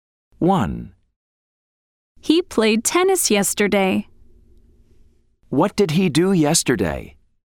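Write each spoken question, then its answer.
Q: What did he do yesterday?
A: He played tennis.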